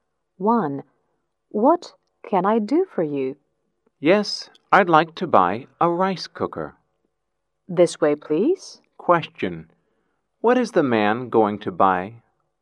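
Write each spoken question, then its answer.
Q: What is the man going to buy?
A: A rice cooker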